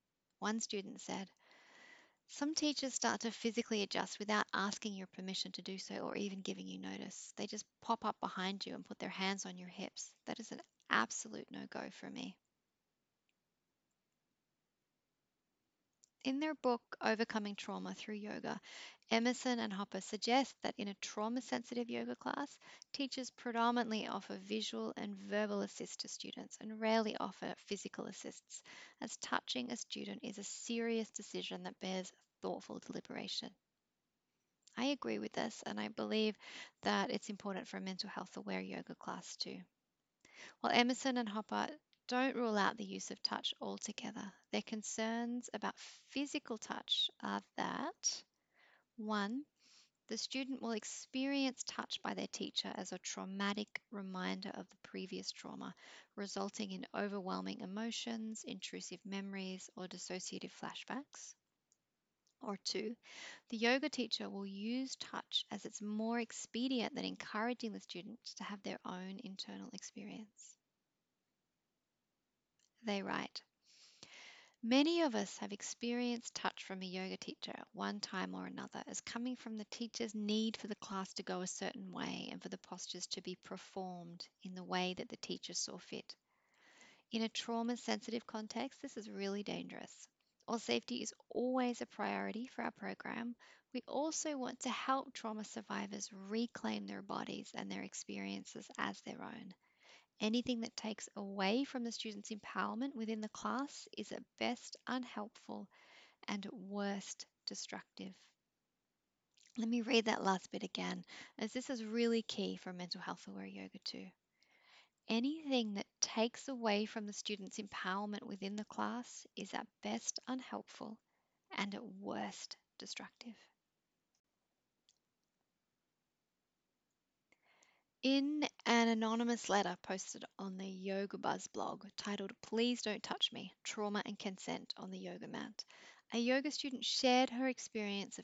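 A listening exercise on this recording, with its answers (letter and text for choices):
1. Why might touching your students be inappropriate at times?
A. A student may experience touch as a traumatic reminder of a previous trauma, resulting in overwhelming emotions, intrusive memories or dissociative flashbacks.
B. A Yoga Teacher may use touch out of a desire for the postures to be performed in a particular way, and this can take away from the student's empowerment.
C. All of the above.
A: C. All of the above.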